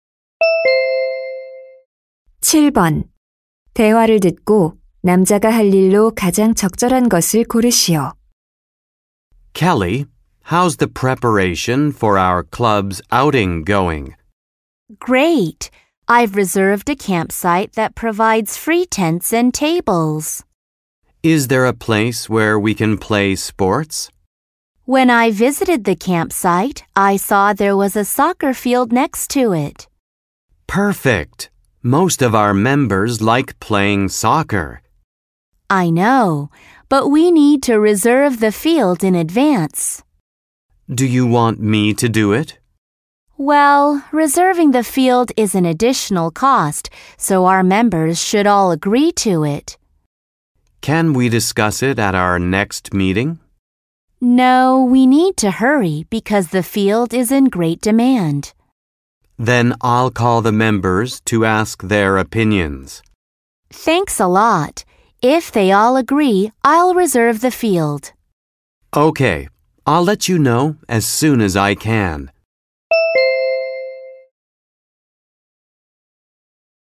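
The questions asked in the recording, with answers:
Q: 대화를 듣고 남자가 할 일로 가장 적절한 것을 고르시오.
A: 동아리 회원들에게 전화해서 의견 묻기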